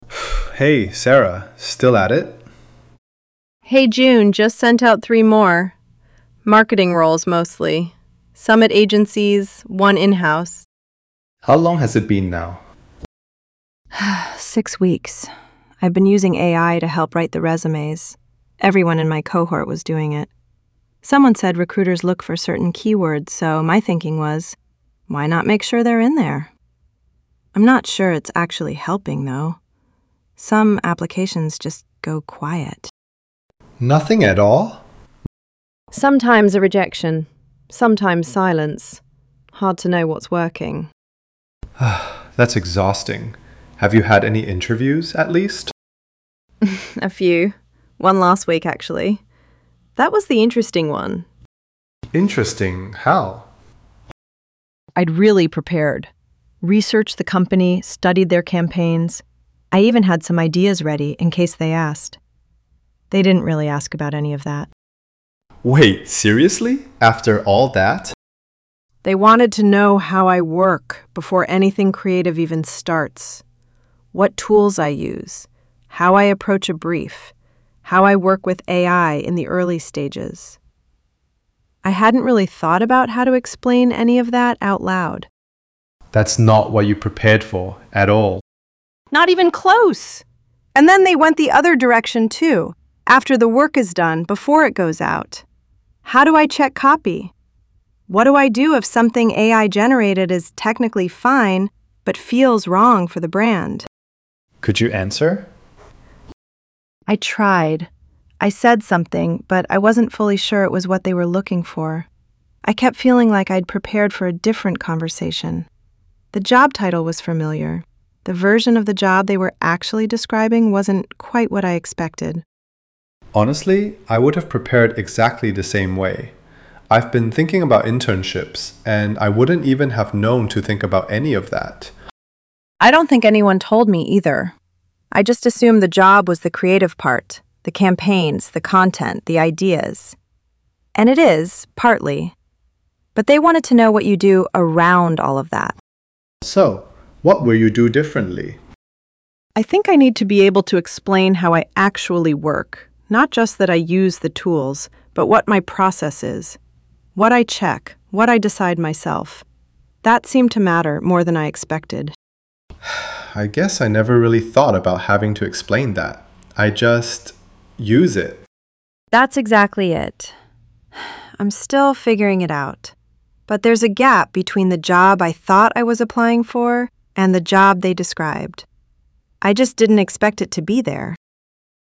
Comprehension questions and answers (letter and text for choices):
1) What did Sarah find most unexpected about her recent job interview?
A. The interviewer focused on her familiarity with the company's recent campaigns rather than her general marketing knowledge.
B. The interviewer asked her to walk through how she uses AI tools in her work process, not just her knowledge of marketing.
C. The interviewer asked her to use AI to complete a campaign brief during the interview.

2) What does Sarah's experience mainly suggest about jobs today?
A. Young people need better guidance on how to prepare for jobs in a changing market.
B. Familiar job titles can hide how much the work itself has changed.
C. Jobs today are harder to secure than they were for previous generations.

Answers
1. B. The interviewer asked her to walk through how she uses AI tools in her work process, not just her knowledge of marketing.
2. B. Familiar job titles can hide how much the work itself has changed.